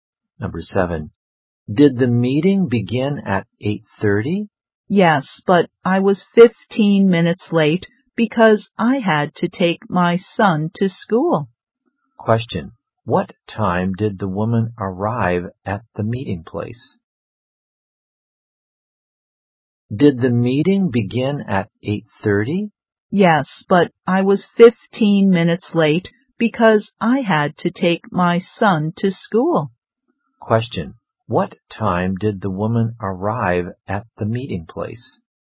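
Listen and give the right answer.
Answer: At 8:45.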